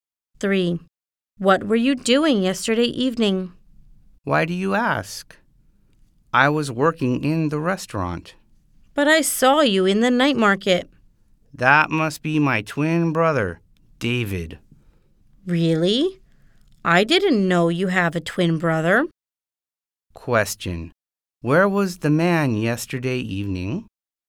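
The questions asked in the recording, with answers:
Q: Question. Where was the man yesterday evening?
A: In the restaurant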